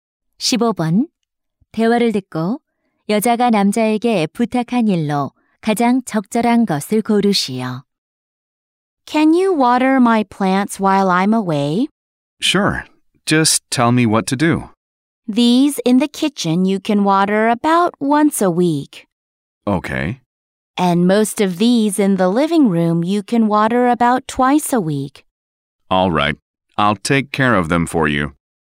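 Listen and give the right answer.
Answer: 식물에 물 주기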